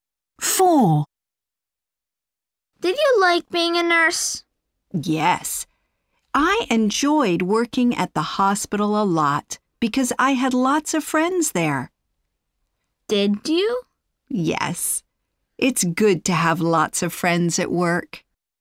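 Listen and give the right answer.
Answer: Yes, because she had lots of friends there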